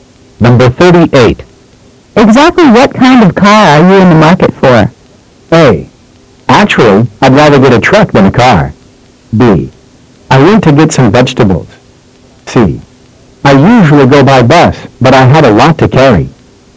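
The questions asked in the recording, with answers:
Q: Exactly what kind of car are you in the market for?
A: A: Actually, I'd rather get a truck than a car.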